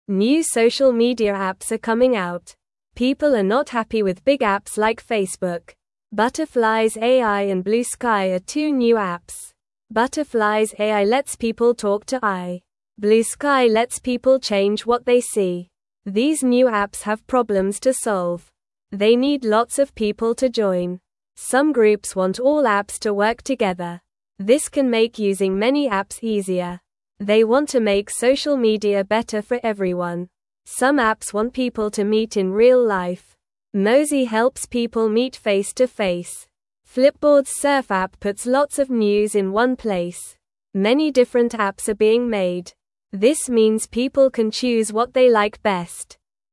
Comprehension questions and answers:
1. What are the names of the two new apps mentioned in the article?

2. What does Butterflies AI let people do?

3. What does Bluesky help people change?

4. Why do some groups want all apps to work together?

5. What does Mozi help people do?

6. What does Flipboard's Surf app do?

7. Why are many different apps being made?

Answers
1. Butterflies AI and Bluesky.
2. It lets people talk to AI.
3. It helps people change what they see.
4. They want to make using many apps easier.
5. It helps people meet face-to-face.
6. It puts lots of news in one place.
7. So people can choose what they like best.

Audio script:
New social media apps are coming out. People are not happy with big apps like Facebook. Butterflies AI and Bluesky are two new apps. Butterflies AI lets people talk to AI. Bluesky lets people change what they see.
These new apps have problems to solve. They need lots of people to join. Some groups want all apps to work together. This can make using many apps easier. They want to make social media better for everyone.
Some apps want people to meet in real life. Mozi helps people meet face-to-face. Flipboard's Surf app puts lots of news in one place. Many different apps are being made. This means people can choose what they like best.

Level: Level 1